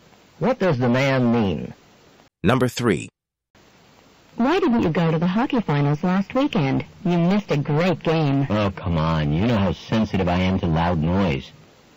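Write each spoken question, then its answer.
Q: What can be inferred about the man?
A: He avoids hockey games because they are too loud.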